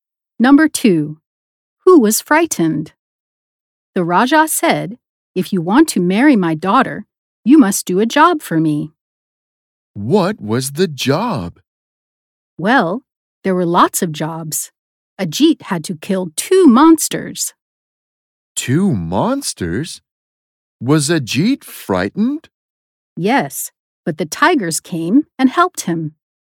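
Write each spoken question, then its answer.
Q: Who was frightened?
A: Ajit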